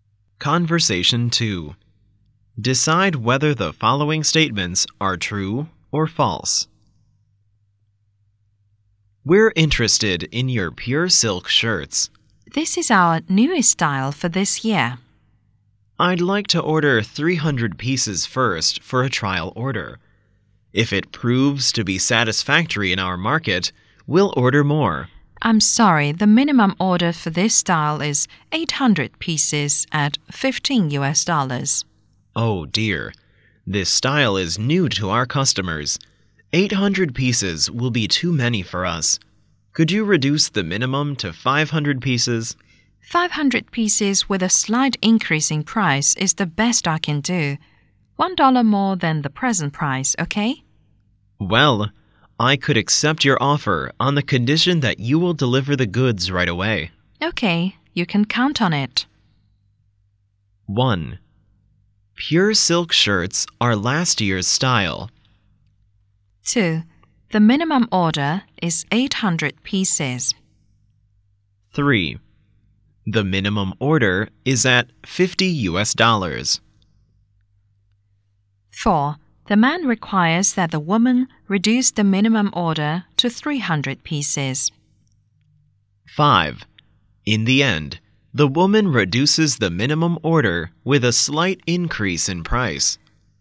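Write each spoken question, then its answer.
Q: Pure silk shirts are last year's style.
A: False

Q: The minimum order is 800 pieces.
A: True

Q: The minimum order is at $50.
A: False

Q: The man requires that the woman reduce the minimum order to 300 pieces.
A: False

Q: In the end, the woman reduces the minimum order with a slight increase in price.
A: True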